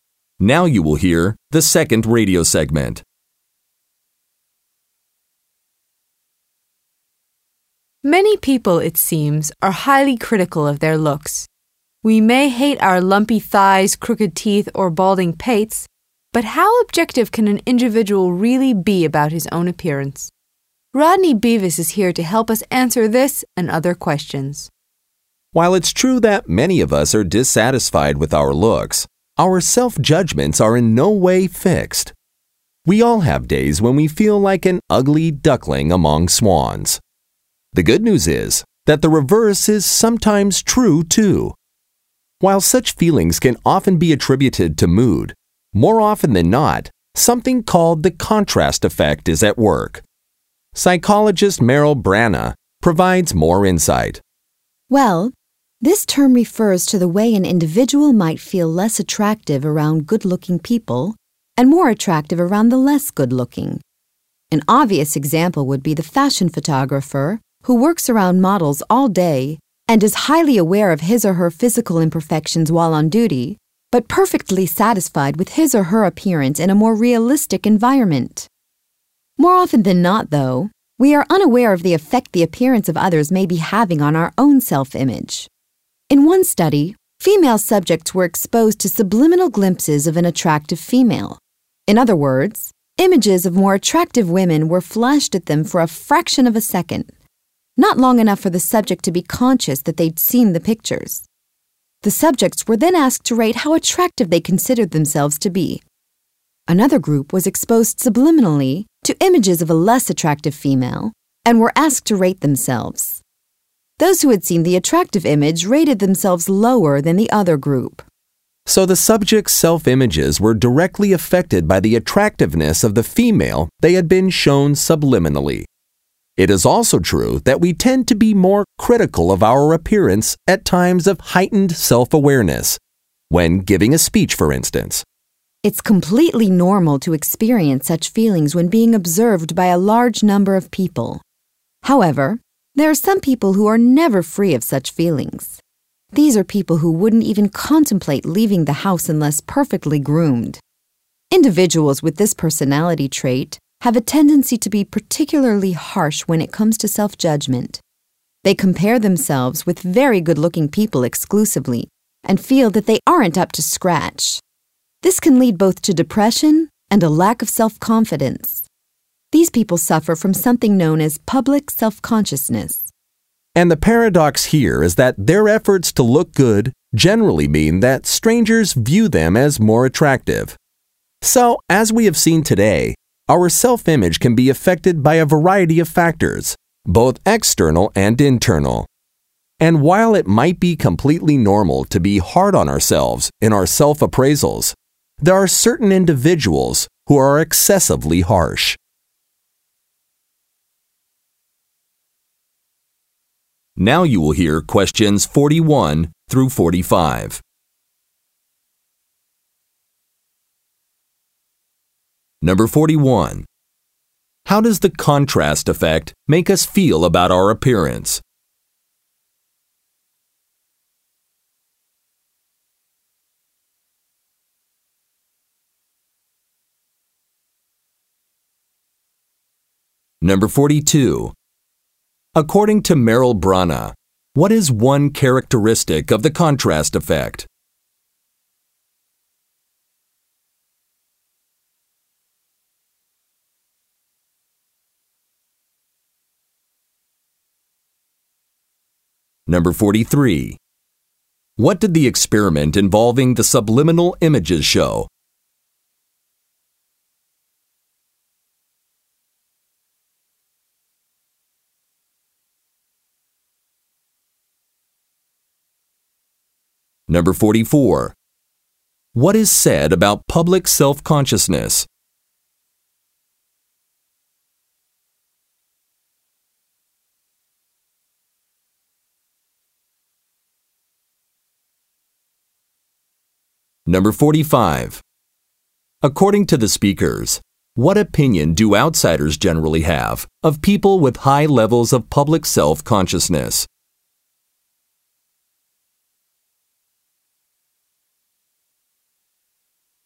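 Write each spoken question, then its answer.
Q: How does the contrast effect make us feel about our appearance?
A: Less attractive around good-looking people, more attractive around less good-looking people

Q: What did the experiment involving the subliminal images show?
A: Self-image was affected by the attractiveness of the woman shown

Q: According to the speakers, what opinion do outsiders generally have of people with high levels of public self-consciousness?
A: They see them as more attractive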